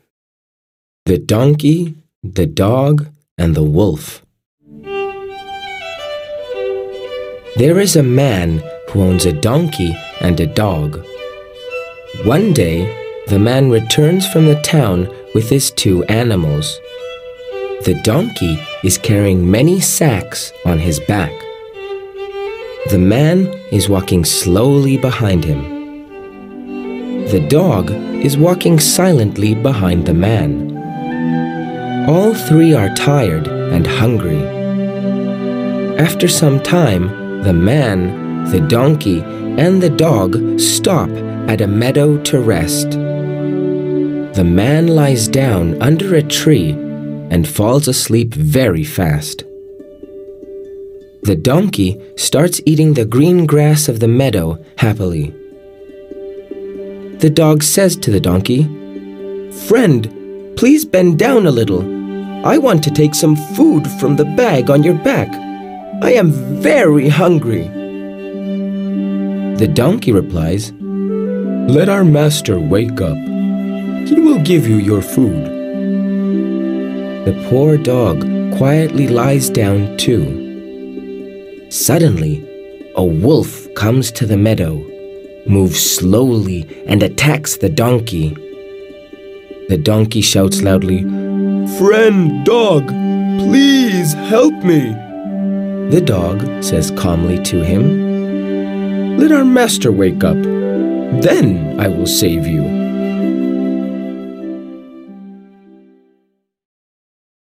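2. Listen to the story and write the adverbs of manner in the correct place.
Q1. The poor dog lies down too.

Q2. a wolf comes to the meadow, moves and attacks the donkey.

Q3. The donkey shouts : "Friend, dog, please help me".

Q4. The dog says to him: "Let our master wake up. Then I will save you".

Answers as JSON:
{"1": "quietly", "2": "Suddenly; slowly", "3": "loudly", "4": "calmly"}

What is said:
The donkey, the dog and the wolf.
There is a man who owns a donkey and a dog. One day the man returns from the town with his two animals. The donkey is carrying many sacks on his back. The man is walking behind him.
The dog is walking behind the man. All three are tired and hungry. After some time, the man, the donkey and the dog stop at a meadow to rest. The man lies down under a tree and falls asleep very .
The donkey starts eating the green grass of the meadow . The dog says to the donkey: "Friend, please bend down a little. 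I want to take some food from the bag on your back. I am very hungry". The donkey replies, "Let our master wake up. He will give you your food".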